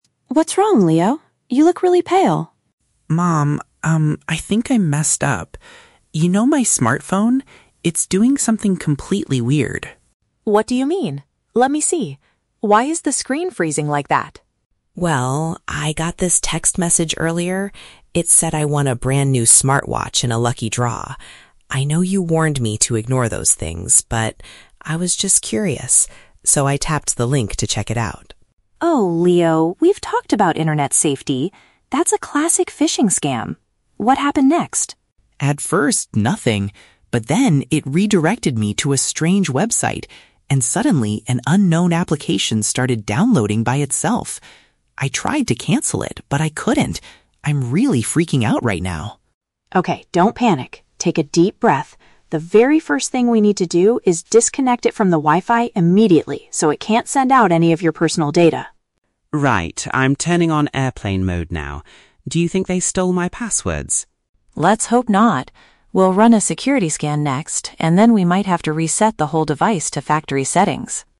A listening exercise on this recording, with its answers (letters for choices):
Listen to the conversation between Leo and his mother, then choose the correct answer (A, B, or C) for each question.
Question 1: Why did Leo tap the link in the text message?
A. He was looking for a website to buy a new smartwatch.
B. He wanted to see if the prize announcement was real.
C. He needed to download a new application for his phone.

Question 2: How does Leo feel about his current situation?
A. He is extremely scared because of his mistake.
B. He is annoyed because his smartphone is too slow.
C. He is angry that his mother wants to reset his device.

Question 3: What is the mother's immediate instruction to solve the problem?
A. To delete the unknown application right away.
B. To change all of his internet passwords immediately.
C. To cut off the phone's internet connection.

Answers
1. B
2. A
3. C

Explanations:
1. Leo says he got a message saying he "won a brand new smartwatch" and he "was just curious" so he tapped the link. This matches option B (wanting to see if the prize was real). Why the traps are wrong: Option A is not mentioned; he didn't want to buy one, he was told he won one. Option C is a trap because an application did download, but it was an accident, not his original intention.
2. Leo says "I think I messed up" and "I'm really freaking out right now." "Freaking out" is a synonym for being extremely scared or panicked. Why the traps are wrong: Option B is a trap; the screen is "freezing" (stuck), but his main emotion is panic, not just annoyance over a slow phone. Option C is plausible but incorrect; he is not angry at his mom.
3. The mother clearly states, "The very first thing we need to do is disconnect it from the Wi-Fi immediately." This means cutting off the internet connection (Option C). Why the traps are wrong: Option A is plausible, but the mother doesn't tell him to delete the app first (the phone is frozen anyway). Option B is a trap because Leo asks about his "passwords," but changing them is not the immediate action the mother suggests.

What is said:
Mom: What's wrong, Leo? You look really pale.
I think I messed up. You know my smartphone? It's doing something completely weird.
Mom: What do you mean? Let me see. Why is the screen freezing like that?
Leo: Well, I got this text message earlier. It said I won a brand new smartwatch in a lucky draw. I know you warned me to ignore those things, but... I was just curious. So, I tapped the link to check it out.
Mom: Oh, Leo! We've talked about internet safety. That's a classic phishing scam. What happened next?
Leo: At first, nothing. But then, it redirected me to a strange website, and suddenly, an unknown application started downloading by itself. I tried to cancel it, but I couldn't! I'm really freaking out right now.
Mom: Okay, don't panic. Take a deep breath. The very first thing we need to do is disconnect it from the Wi-Fi immediately so it can't send out any of your personal data.
Leo: Right, I'm turning on airplane mode now. Do you think they stole my passwords?
Mom: Let's hope not. We'll run a security scan next, and then we might have to reset the whole device to factory settings.